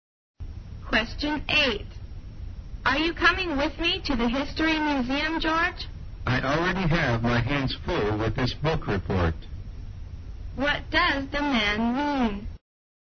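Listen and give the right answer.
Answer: He is too busy with his book report to go.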